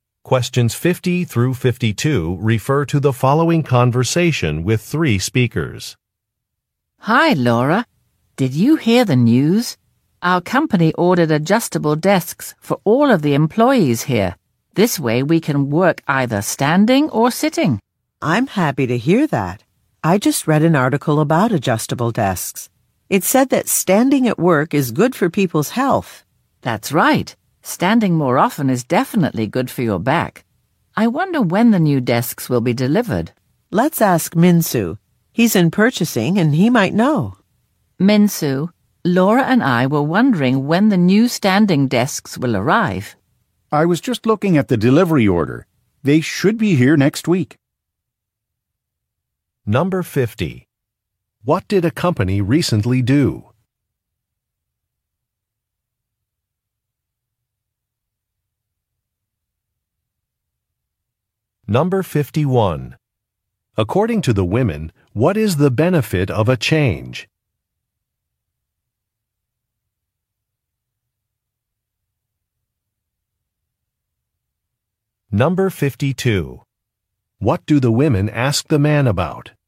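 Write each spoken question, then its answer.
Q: What did a company recently do?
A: Ordered adjustable desks for all employees

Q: According to the women, what is the benefit of a change?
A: It is good for people's health (back)

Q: What do the women ask the man about?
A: When the new desks will be delivered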